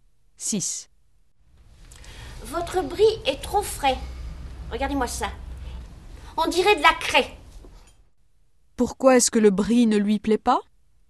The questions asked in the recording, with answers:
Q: Pourquoi est-ce que le brie ne lui plaît pas?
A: Parce qu'il est trop frais.